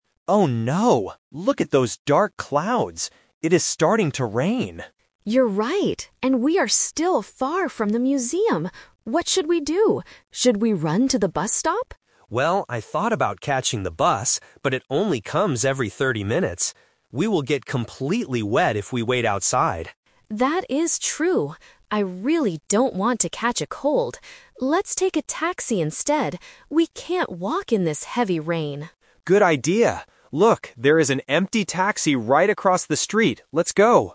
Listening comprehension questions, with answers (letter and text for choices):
Listen to the conversation and choose the correct answer (A, B, or C).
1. Where are Mark and Anna trying to go?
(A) To the bus stop.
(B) To the museum.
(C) To a coffee shop.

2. Why doesn't Mark want to take the bus?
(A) Because they would have to wait a long time.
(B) Because the bus tickets are too expensive.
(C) Because he wants to keep walking in the rain.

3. What do they decide to do at the end?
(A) Run to the bus stop.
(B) Call their friends for help.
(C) Take a taxi.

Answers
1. (B) To the museum.
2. (A) Because they would have to wait a long time.
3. (C) Take a taxi.

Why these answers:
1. Anna clearly says, "And we are still far from the museum." Option A is the Trap because she mentions running to the bus stop, but the bus stop is just a way to travel, not their final destination. Option C is a plausible place to hide from the rain but is not mentioned.
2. Mark rejects the bus because "it only comes every thirty minutes" and they will get wet if they wait outside. Option B is a plausible reason but is not mentioned. Option C is the Trap (Mark says the opposite: they will get wet if they stay outside, so he doesn't want to walk).
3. This is The Twist (the final result). Anna suggests, "Let's take a taxi instead," and Mark agrees. Option A is the Trap (it was Anna's first suggestion, but Mark rejected it). Option B is not mentioned.

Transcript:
Mark: Oh no, look at those dark clouds! It is starting to rain.
Anna: You're right. And we are still far from the museum. What should we do? Should we run to the bus stop?
Mark: Well, I thought about catching the bus, but it only comes every thirty minutes. We will get completely wet if we wait outside.
Anna: That is true. I really don't want to catch a cold. Let's take a taxi instead. We can't walk in this heavy rain!